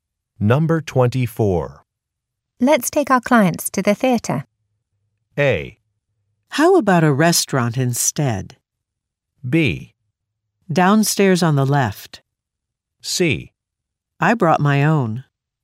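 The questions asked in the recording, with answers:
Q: Let's take our clients to the theater.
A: A: How about a restaurant instead?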